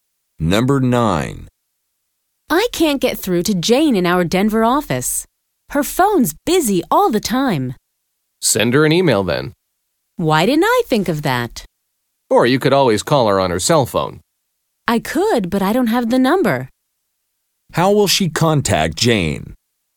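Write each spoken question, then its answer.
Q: How will she contact Jane?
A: By email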